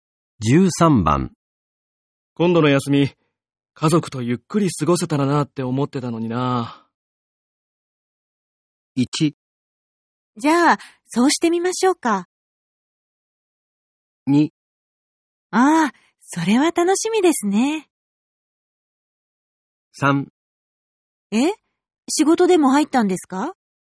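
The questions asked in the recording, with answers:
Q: 今度の休み、家族とゆっくり過ごせたらなって思ってたのにな。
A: 3: え?仕事でも入ったんですか?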